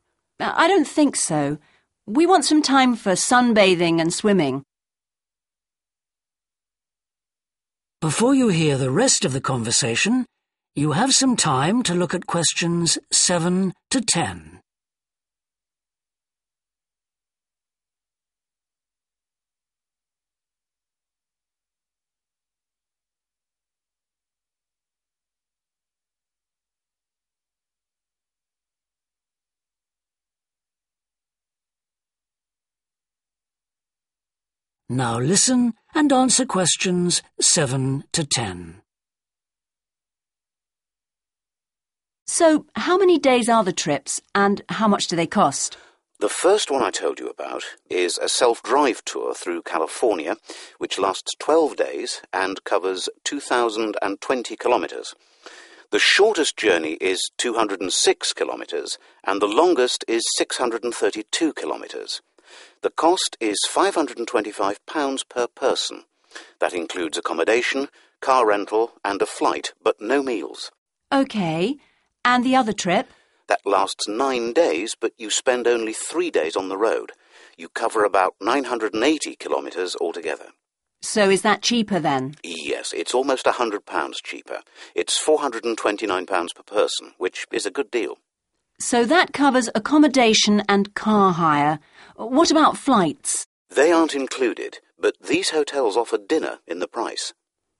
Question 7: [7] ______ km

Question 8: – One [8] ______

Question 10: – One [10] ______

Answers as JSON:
{"7": "2020", "8": "flight", "10": "dinner"}

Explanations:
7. a self-drive tour through California which lasts twelve days and covers 2,020 kilometres. (chuyến du lịch tự lái qua California kéo dài mười hai ngày và quãng đường dài 2.020 km)
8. That includes accommodation, car rental and a flight but no meals. (Bao gồm chỗ ở, tiền thuê xe và vé chuyến bay nhưng không có bữa ăn đi kèm)
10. these hotels offer (= includes) dinner in the price. (những khách sạn này sẽ cung cấp bữa tối, chi phí đã được bao gồm trong giá phòng)